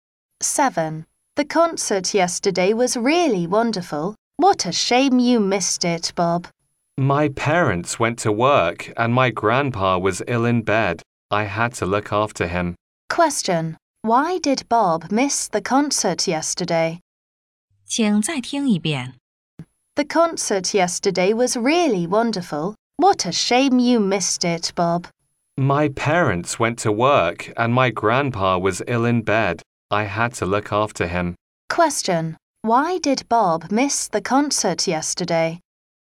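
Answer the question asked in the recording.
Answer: He had to look after his grandpa, who was ill in bed.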